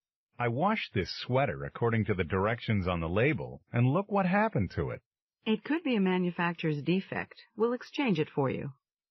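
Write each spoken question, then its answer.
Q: What does the woman mean?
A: The store will exchange the damaged sweater for him.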